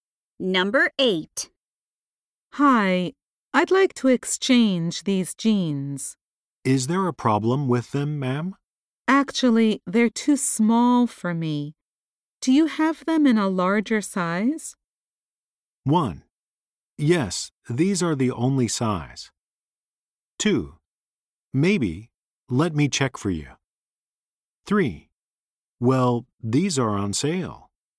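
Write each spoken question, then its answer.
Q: Do you have them in a larger size?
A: 2: Maybe, let me check for you.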